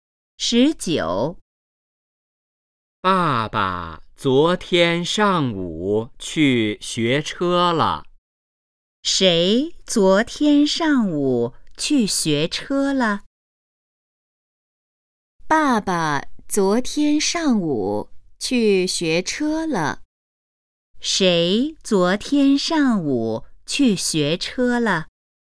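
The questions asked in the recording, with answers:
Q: 谁昨天上午去学车了?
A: 爸爸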